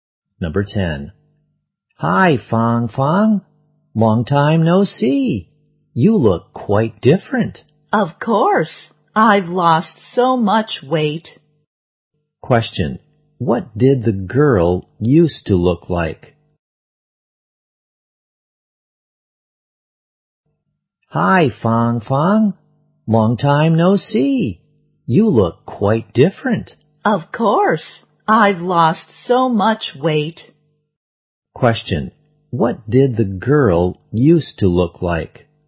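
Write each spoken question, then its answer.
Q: What did the girl used to look like?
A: Heavy (fat)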